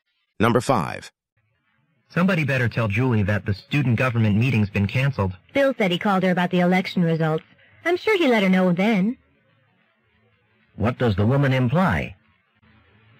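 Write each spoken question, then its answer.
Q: What does the woman imply?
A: Julie probably already knows the meeting was canceled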